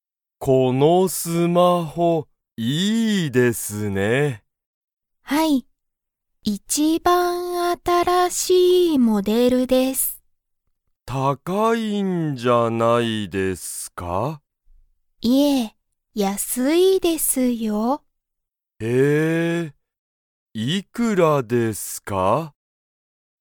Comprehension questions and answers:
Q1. このスマホは、____モデルだ。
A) 一番新(いちばんあたら)しい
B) すごく高(たか)い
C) 一番安(いちばんやす)い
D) すごくきれいな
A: A) 一番新(いちばんあたら)しい

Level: Level 1

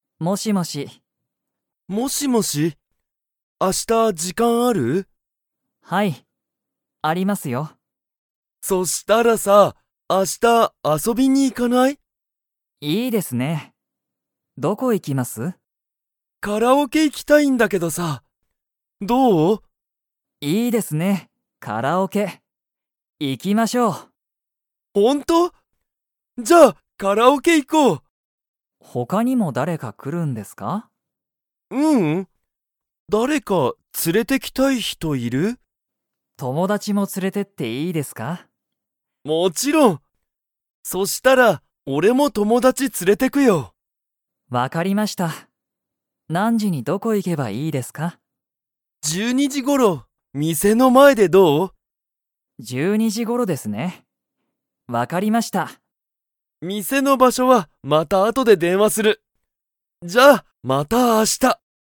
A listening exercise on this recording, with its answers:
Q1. ナオキは、友達(ともだち)も連(つ)れていきますか?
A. はい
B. いいえ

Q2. ナオキとケントは、12時頃(じゅうにじごろ)、____で会(あ)う。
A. 店(みせ)の前(まえ)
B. 友達(ともだち)の店(みせ)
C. 明日(あした)の時間(じかん)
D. 学校(がっこう)の後(あと)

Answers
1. A. はい
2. A. 店(みせ)の前(まえ)

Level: Level 2

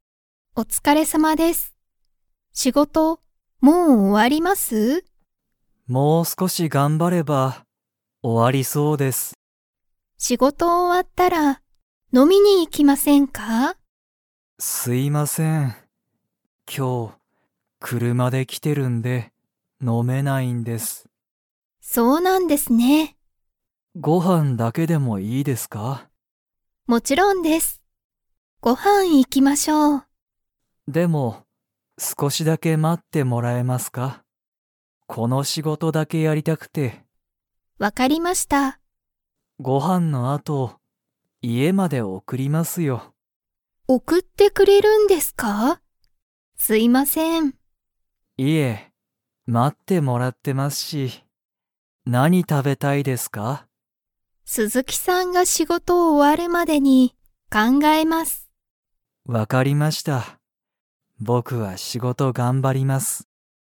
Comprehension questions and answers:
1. 鈴木すずきさんと山田やまださんは、飲のみに行いきますか?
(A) はい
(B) いいえ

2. 鈴木すずきさんは、____まで送おくる。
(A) 鈴木すずきさんの家いえ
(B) 山田やまださんの家いえ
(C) 鈴木すずきさんの会社かいしゃ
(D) 山田やまださんの仕事しごと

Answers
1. (B) いいえ
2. (B) 山田やまださんの家いえ

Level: Level 2

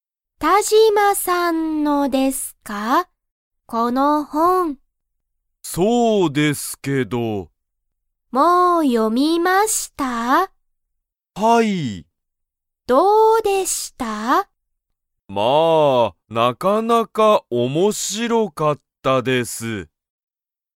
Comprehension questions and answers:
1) 田島(たじま)さんは、その本(ほん)をもう読(よ)みましたか?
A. はい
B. いいえ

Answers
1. A. はい

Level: Level 1

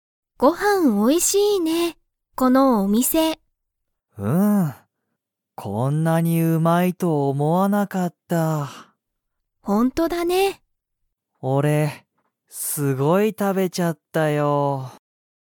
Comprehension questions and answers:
カイトは、____うまいと思おもわなかった。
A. 一緒いっしょに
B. みんなで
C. こんなに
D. 最近さいきん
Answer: C. こんなに

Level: Level 1

